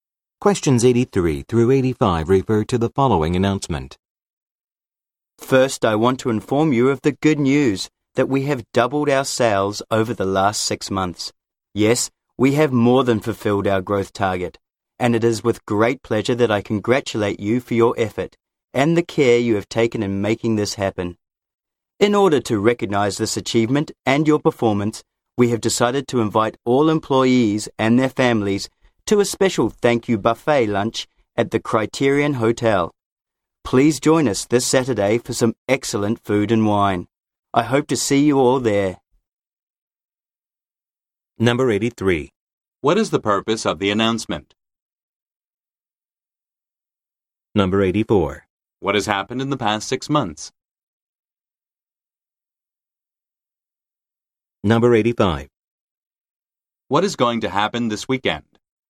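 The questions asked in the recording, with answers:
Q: What is the purpose of the announcement?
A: To congratulate employees on doubled sales and invite them to a thank-you lunch

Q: What has happened in the past 6 months?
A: Sales have doubled

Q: What is going to happen this weekend?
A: A thank-you buffet lunch at the Criterion Hotel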